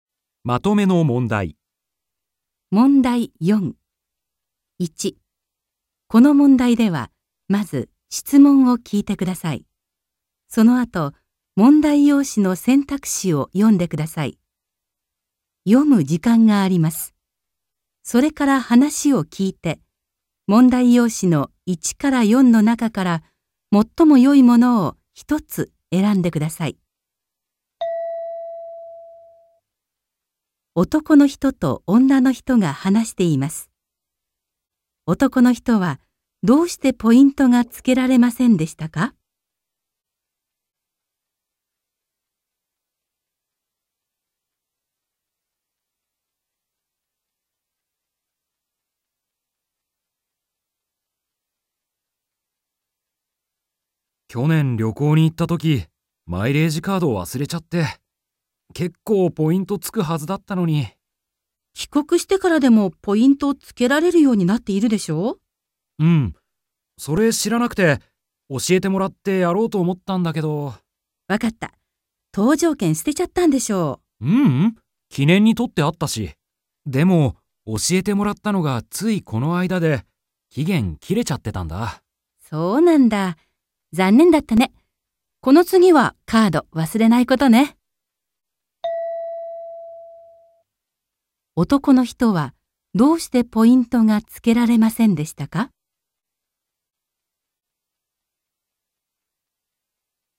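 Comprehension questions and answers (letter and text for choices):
1.この問題では、まず質問を聞いてください。 そのあと、問題用紙の選択肢を読んでください。読む時間があります。 それから話を聞いて、問題用紙の1から4の中から、最もよいものを一つ選んでください。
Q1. 男の人はどうしてポイントがつけられませんでしたか。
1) カードをなくしたから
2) 搭乗券とうじょうけんをなくしたから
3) 搭乗券とうじょうけんを捨ててしまったから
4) 手続てつづききの期間きかんが終わっていたから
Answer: 4) 手続てつづききの期間きかんが終わっていたから

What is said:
男の人と女の人が電話で話しています。男の人はどうしてポイントがつけられませんでしたか。
M: 去年旅行に行ったとき、マイレージカード忘れちゃって。けっこうポイントつくはずだったのに・・・。
F: 帰国してからでもポイントつけられるようになっているでしょ?
M: うん、それ知らなくて、教えてもらってやろうと思ったんだけど・・・。
F: わかった。搭乗券捨てちゃったんでしょ。
M: ううん。記念に取ってあったし・・・。でも教えてもらったのがついこの間で、期限切れちゃってたんだ。
F: そうなんだ。残念だったね。この次はカード忘れないことね。

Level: N2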